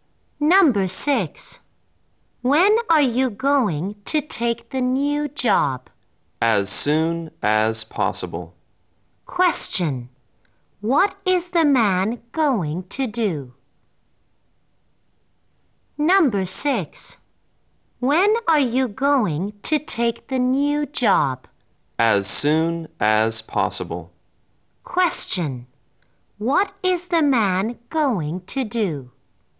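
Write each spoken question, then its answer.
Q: What is the man going to do?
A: Take the new job as soon as possible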